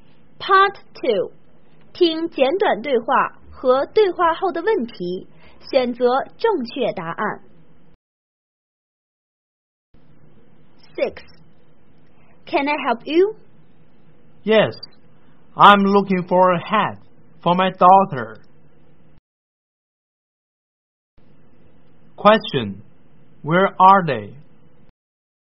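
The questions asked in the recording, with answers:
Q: Question, where are they?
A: In a shop (hat store)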